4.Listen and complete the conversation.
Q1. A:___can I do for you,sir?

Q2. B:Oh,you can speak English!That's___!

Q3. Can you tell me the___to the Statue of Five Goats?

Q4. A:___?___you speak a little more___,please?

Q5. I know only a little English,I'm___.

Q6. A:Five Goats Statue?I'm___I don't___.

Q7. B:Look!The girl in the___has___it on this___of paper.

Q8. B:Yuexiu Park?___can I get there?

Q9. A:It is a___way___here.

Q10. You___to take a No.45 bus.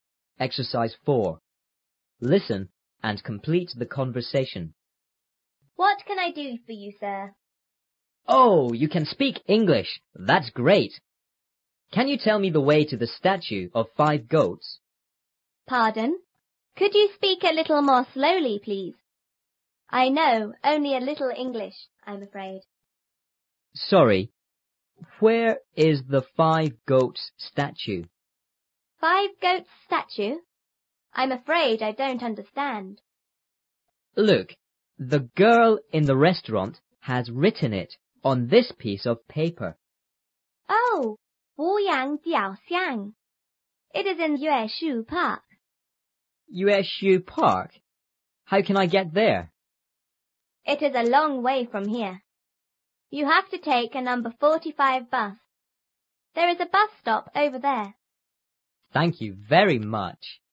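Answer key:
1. What
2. great
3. way
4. Pardon; Could; slowly
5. afraid
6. afraid; understand
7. restaurant; written; piece
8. How
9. long; from
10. have

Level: 初中英语广州版3B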